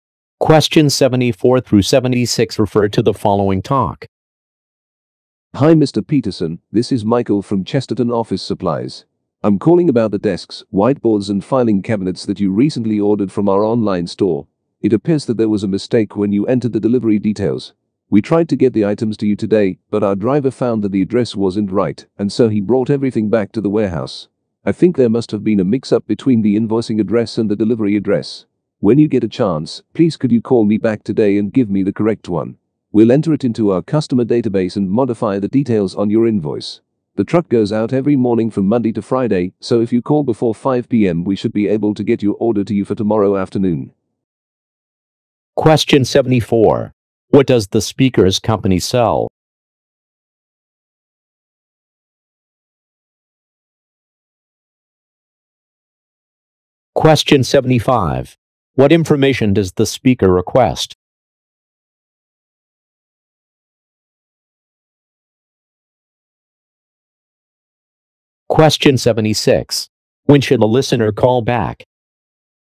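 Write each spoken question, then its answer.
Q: What does the speaker's company sell?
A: Office furniture and supplies

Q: What information does the speaker request?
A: The correct delivery address

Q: When should a listener call back?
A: Today, before 5 p.m.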